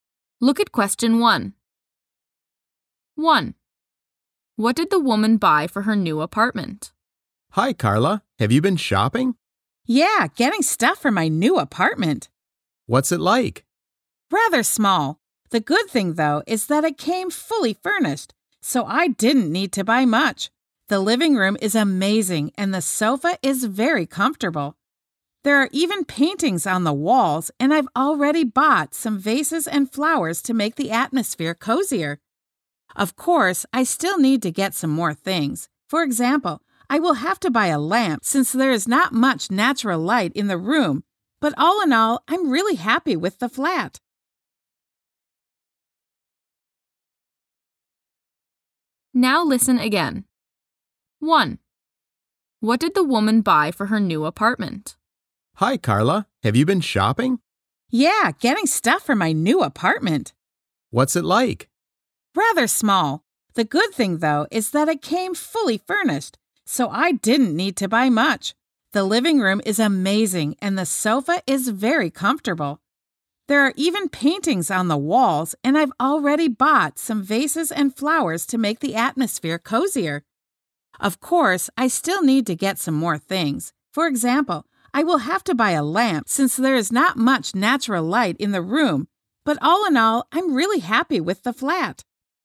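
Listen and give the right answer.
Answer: vases and flowers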